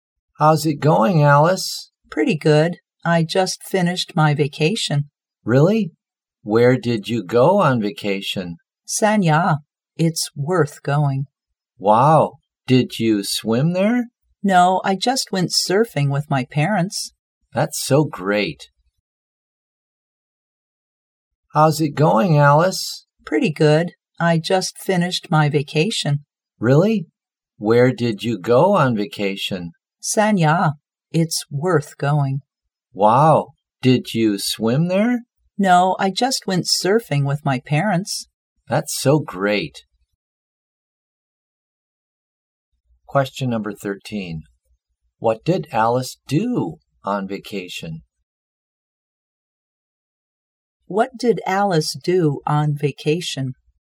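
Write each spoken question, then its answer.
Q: What did Alice do on vacation?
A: She went surfing with her parents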